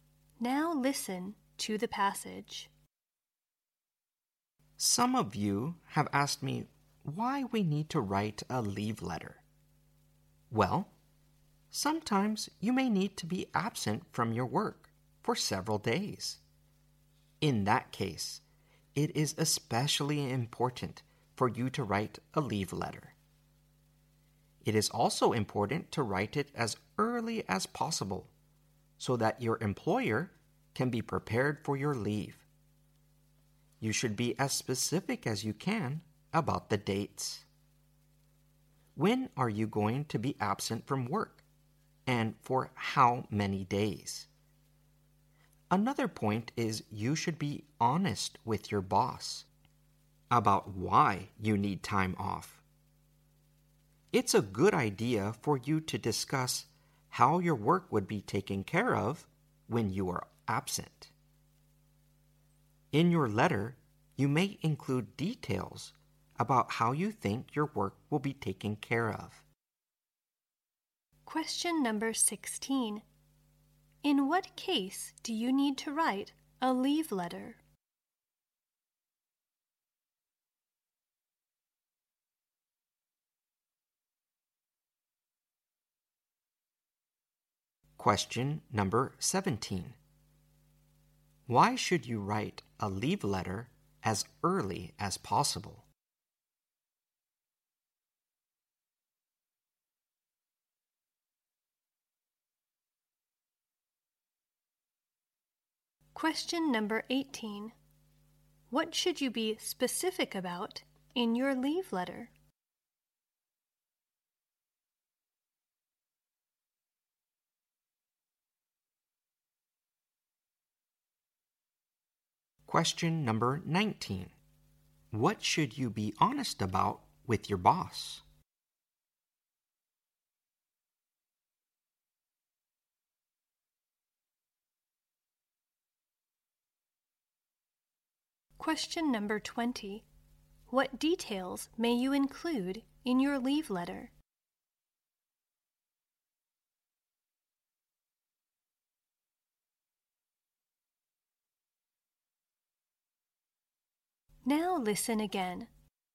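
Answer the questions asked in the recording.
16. When you will be absent from work for several days
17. So your employer can be prepared for your leave
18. The dates
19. Why you need time off
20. How your work will be taken care of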